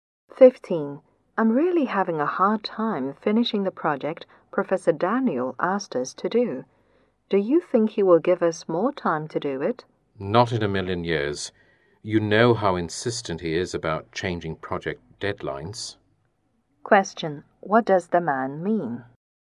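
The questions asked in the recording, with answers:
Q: What does the man mean?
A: The professor will not give them more time.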